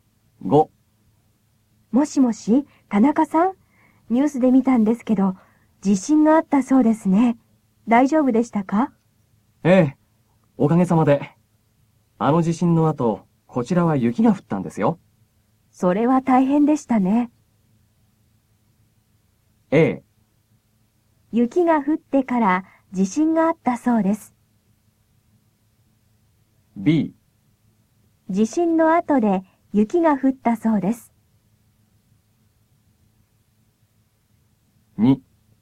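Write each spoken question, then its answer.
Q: 地震の後で雪が降ったそうです。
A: B: 地震の後で雪が降ったそうです。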